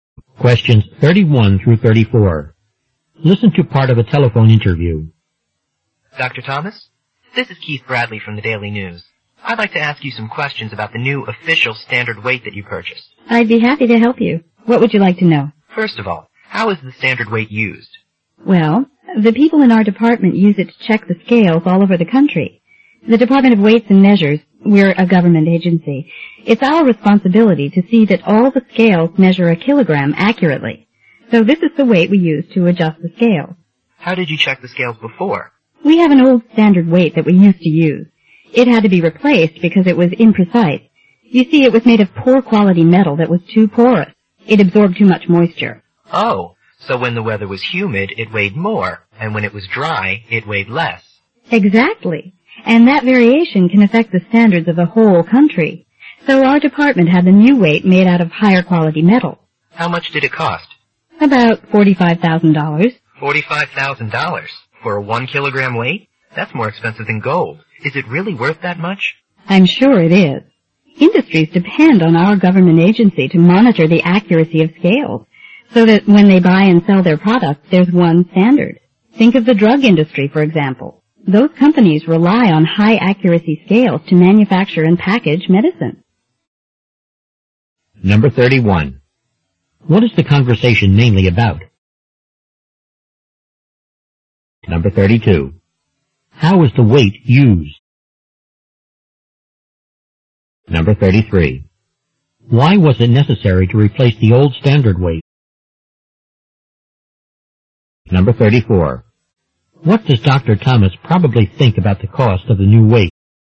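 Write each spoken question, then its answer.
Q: What is the conversation mainly about?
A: The new official standard weight

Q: How is the weight used?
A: To check and adjust scales all over the country

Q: Why was it necessary to replace the old standard weight?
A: Its porous metal absorbed moisture, so it was imprecise.

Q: What does Dr. Thomas probably think about the cost of the new weight?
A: It is worth the cost.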